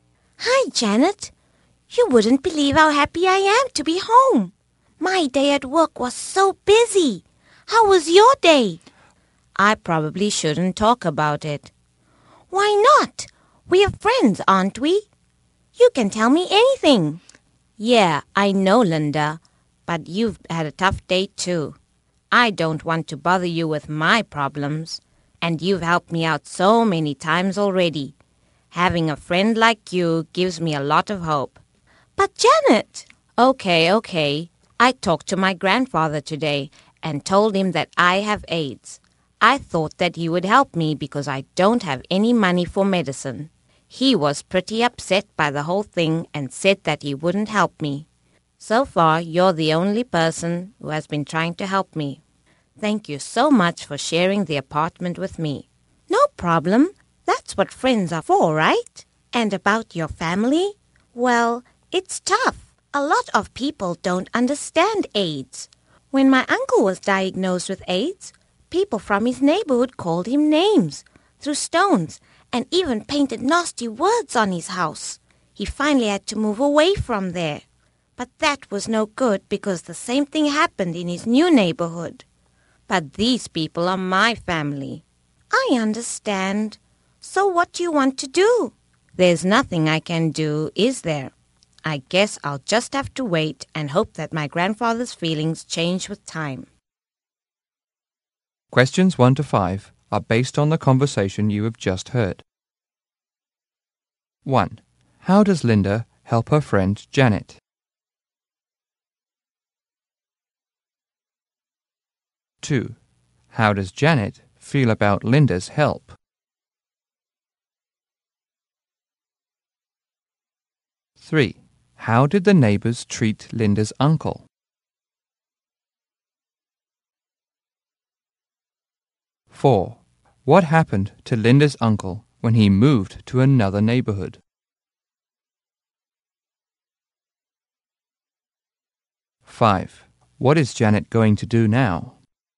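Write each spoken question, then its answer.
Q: How does Linda help her friend Janet?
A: She shares her apartment with her

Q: How does Janet feel about Linda's help?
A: Grateful; it gives her a lot of hope

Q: How did the neighbors treat Linda's uncle?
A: They called him names, threw stones and painted nasty words on his house

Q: What happened to Linda's uncle when he moved to another neighborhood?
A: The same thing happened again

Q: What is Janet going to do now?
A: Wait and hope her grandfather's feelings change with time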